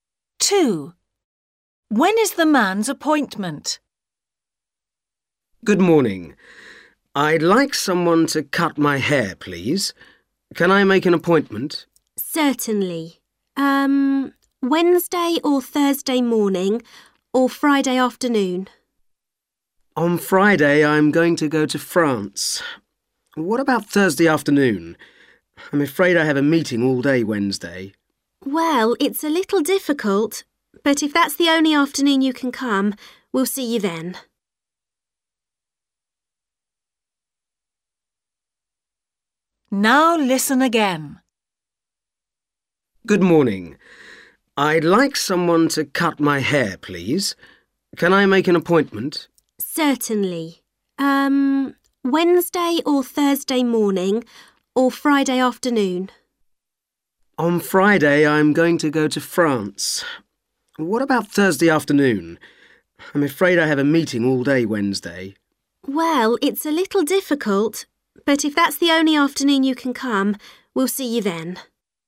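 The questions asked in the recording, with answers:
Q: When is the man's appointment?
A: Thursday afternoon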